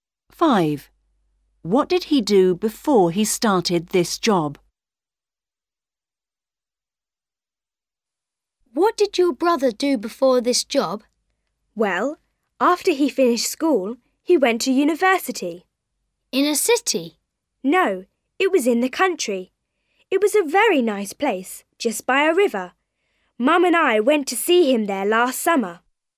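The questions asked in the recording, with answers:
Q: What did he do before he started this job?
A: He went to university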